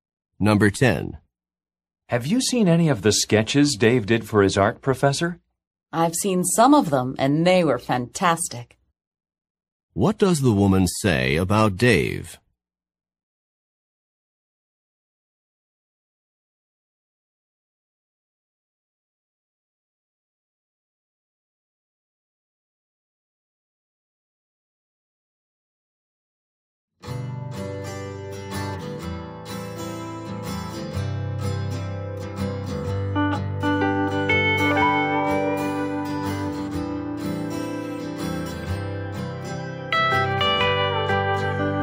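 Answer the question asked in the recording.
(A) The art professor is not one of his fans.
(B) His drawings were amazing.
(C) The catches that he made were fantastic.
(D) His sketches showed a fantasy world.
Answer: (B) His drawings were amazing.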